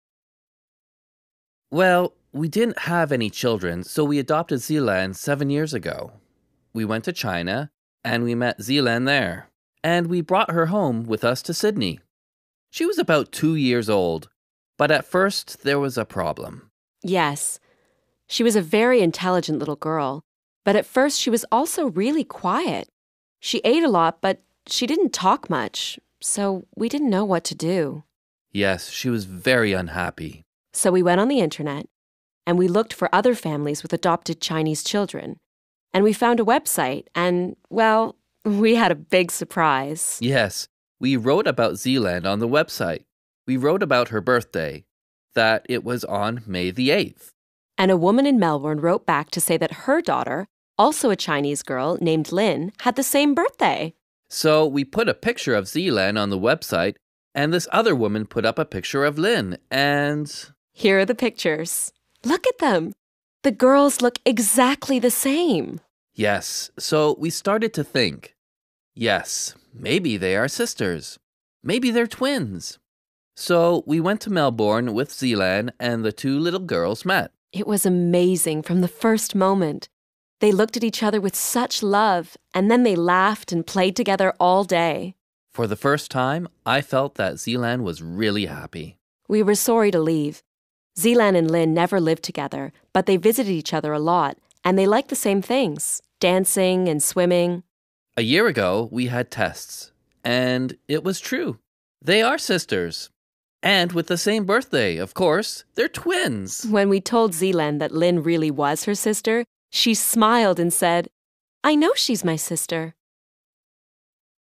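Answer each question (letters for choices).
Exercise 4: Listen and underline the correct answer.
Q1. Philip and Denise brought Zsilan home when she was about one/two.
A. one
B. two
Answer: B

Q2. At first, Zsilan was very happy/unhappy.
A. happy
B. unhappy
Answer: B

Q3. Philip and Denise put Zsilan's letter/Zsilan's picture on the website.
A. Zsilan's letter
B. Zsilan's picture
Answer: B

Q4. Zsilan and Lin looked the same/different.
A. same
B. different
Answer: A

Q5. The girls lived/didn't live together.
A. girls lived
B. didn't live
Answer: B

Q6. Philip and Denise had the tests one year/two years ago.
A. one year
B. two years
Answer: A

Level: A1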